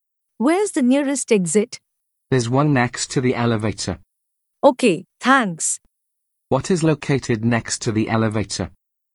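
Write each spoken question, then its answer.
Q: What is located next to the elevator?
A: An exit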